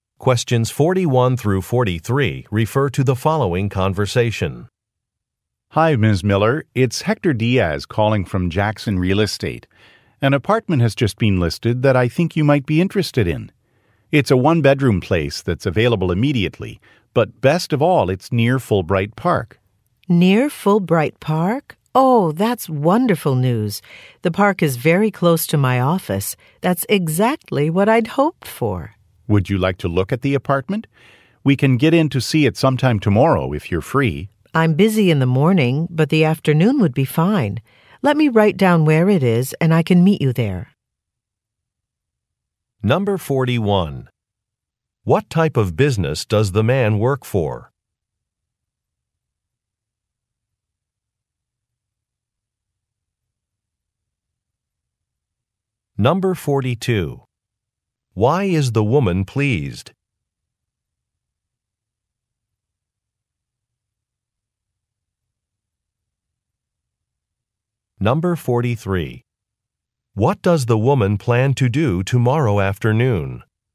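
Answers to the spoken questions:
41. A real estate agency
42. The apartment is near a park close to her office
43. Look at the apartment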